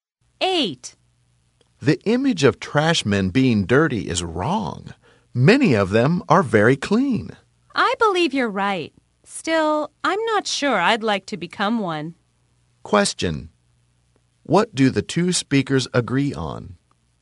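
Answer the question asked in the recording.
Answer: The image of trash men being dirty is wrong.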